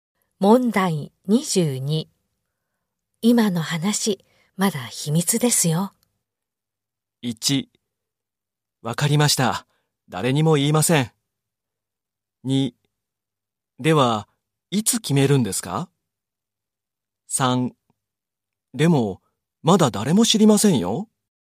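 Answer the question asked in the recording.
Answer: 1: わかりました。誰にも言いません。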